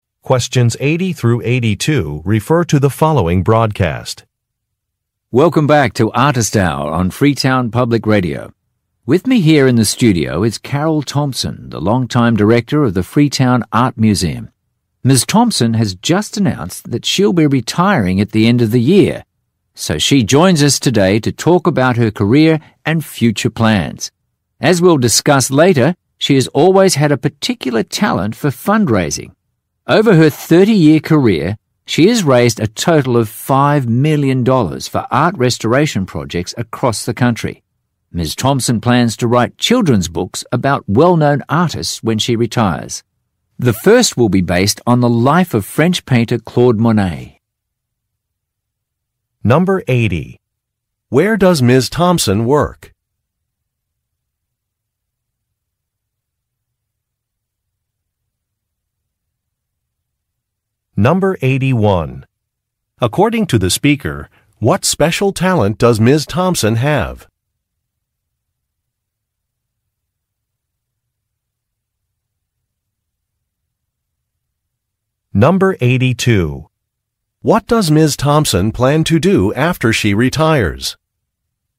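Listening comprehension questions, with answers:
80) Where does Ms.Thompson work?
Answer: At a museum

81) According to the speaker, what special talent does Ms.Thompson have?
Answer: Raising money

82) What does Ms. Thompson plan to do after she retires?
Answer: Become an author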